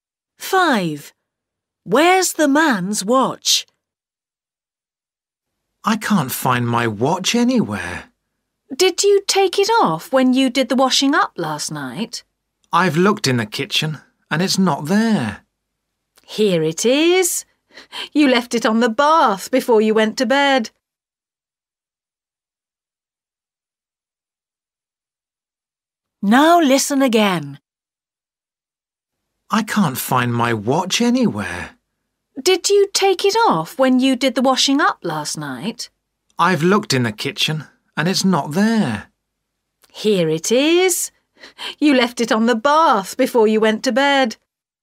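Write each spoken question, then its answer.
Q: Where's the man's watch?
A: on the bath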